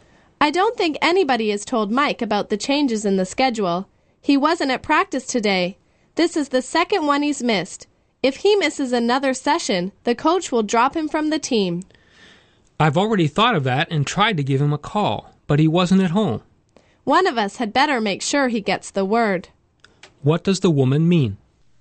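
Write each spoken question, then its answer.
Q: What does the woman mean?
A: One of them must make sure Mike gets the message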